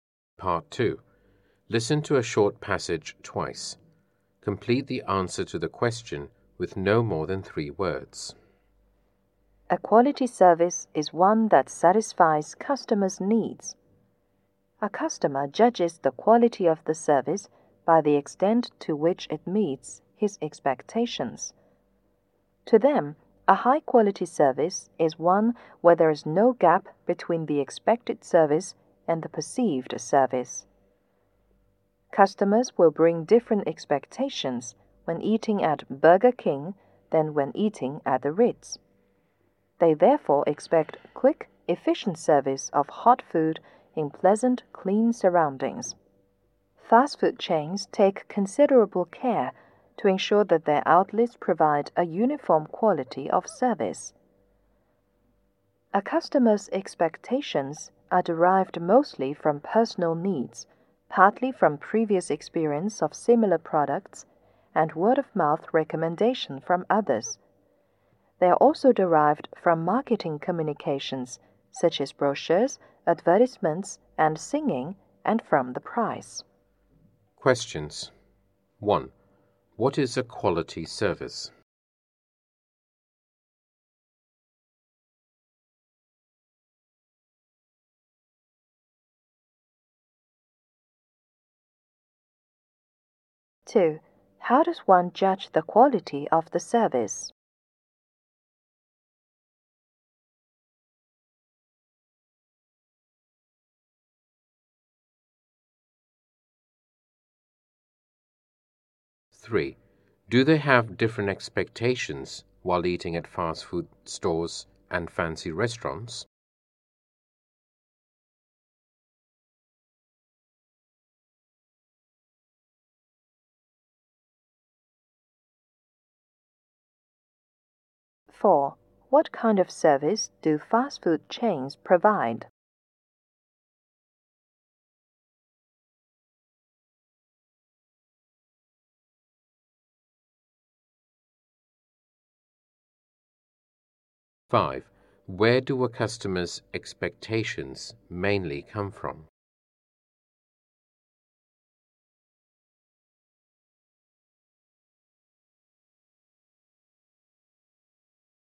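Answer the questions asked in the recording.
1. One that satisfies customers' needs
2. By how far it meets his expectations
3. Yes
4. A uniform quality of service
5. Personal needs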